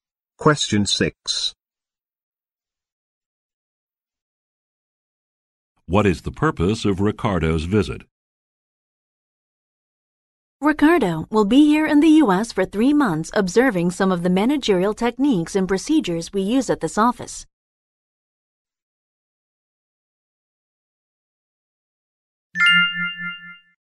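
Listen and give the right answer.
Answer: To observe managerial techniques and procedures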